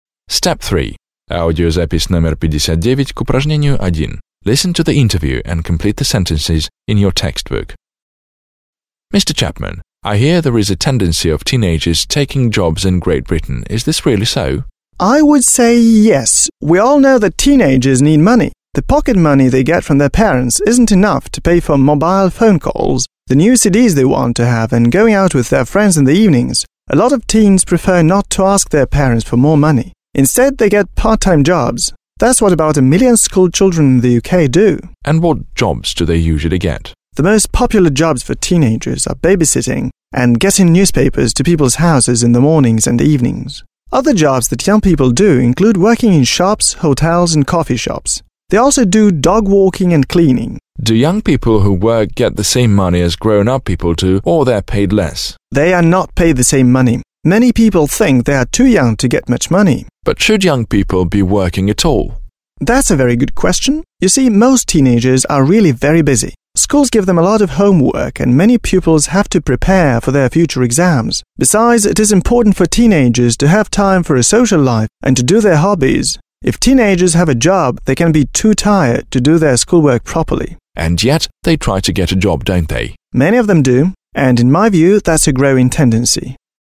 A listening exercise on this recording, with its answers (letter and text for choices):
1. Listen to the interview, (59), and complete the sentences.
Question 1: The interview is about schoolchildren getting jobs.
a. schoolchildren not having enough pocket money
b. schoolchildren getting jobs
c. schoolchildren leaving schools early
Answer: b. schoolchildren getting jobs

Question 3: For the same jobs teenagers usually get less money than grown-ups.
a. less money than grown-ups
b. more money than grown-ups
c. as much money as grown-ups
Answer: a. less money than grown-ups

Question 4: Doing a part-time job can be a problem because working children cannot fully concentrate on their studies.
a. spend too much time at work and don't see their parents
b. cannot fully concentrate on their studies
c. cannot spend more than two or three hours at work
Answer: b. cannot fully concentrate on their studies

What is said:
1. Listen to the interview, (59), and complete the sentences.
− Mr Chapman, I hear there is a tendency of teenagers to take on jobs in Great Britain. Is this really so?
− I would say yes. We all know that teenagers need money. The pocket money they get from their parents isn't enough to pay for mobile phone calls, the new CDs they want to have and going out with their friends in the evenings. A lot of teens prefer not to ask their parents for more money. Instead they get part−time jobs. That's what about a million schoolchildren in the UK do.
− And what jobs do they usually get?
− The most popular jobs for teenagers are babysitting and getting newspapers to people's houses in the mornings and the evenings. Other jobs that young people do include working in shops, hotels and coffee shops. They also do dog walking and cleaning.
− Do young people who work get the same money as grown-up people do or they are paid less?
− They are not paid the same money. Many people think they are too young to get much money.
− But should young people be working at all?
− That's a very good question. You see, most teenagers are really very busy. Schools give them a lot of homework and many pupils have to prepare for their future exams. Besides it is important for teenagers to have time for a social life and hobbies. If teenagers have a job, they can be too tired to do their schoolwork properly.
− And yet they try to get a job, don't they?
− Many of them do and, in my view, that's a growing tendency.

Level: 9 класс